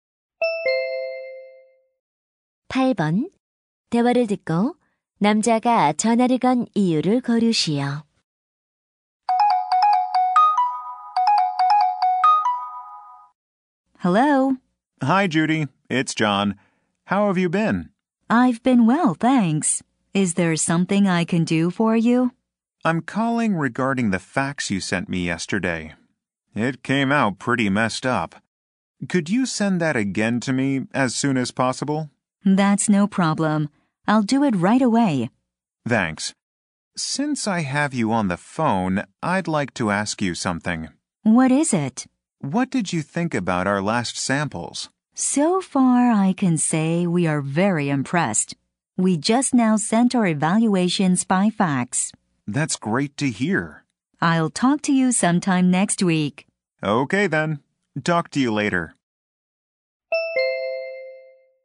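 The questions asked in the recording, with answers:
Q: 대화를 듣고 남자가 전화를 건 이유를 고르시오.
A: 어제 보낸 팩스를 다시 보내 달라고 부탁하려고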